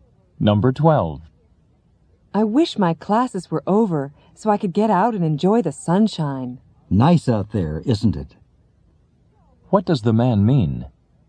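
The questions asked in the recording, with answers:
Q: What does the man mean?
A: It's nice weather outside.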